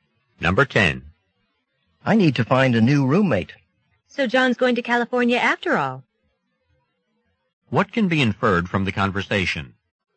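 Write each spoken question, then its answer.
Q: What can be inferred from the conversation?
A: John is moving to California, so the man needs a new roommate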